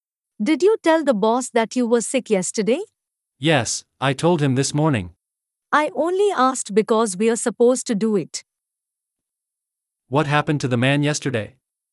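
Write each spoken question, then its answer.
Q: What happened to the man yesterday?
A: He was sick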